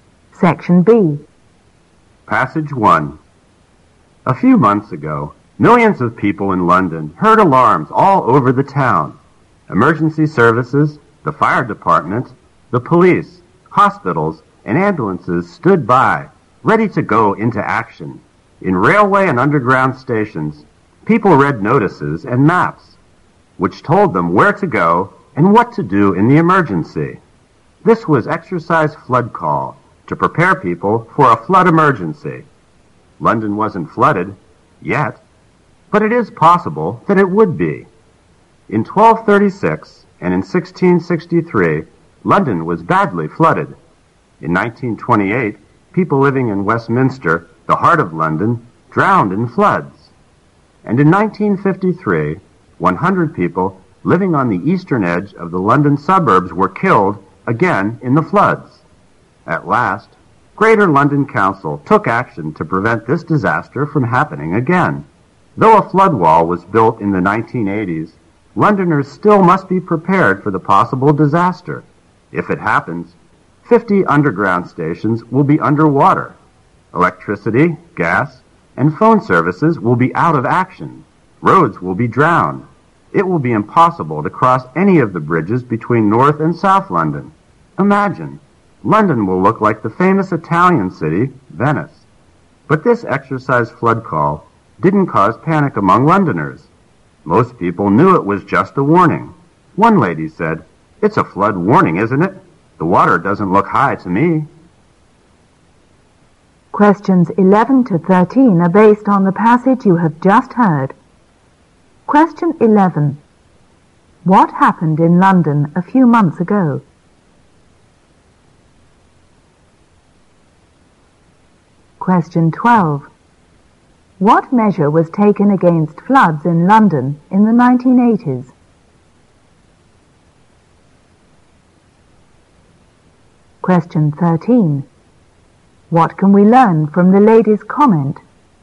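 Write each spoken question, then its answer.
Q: What happened in London a few months ago?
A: A flood emergency exercise (Exercise Flood Call).

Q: What measure was taken against floods in London in the 1980s?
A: A flood wall was built.

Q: What can we learn from the lady's comment?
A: People did not panic; they knew it was just a warning.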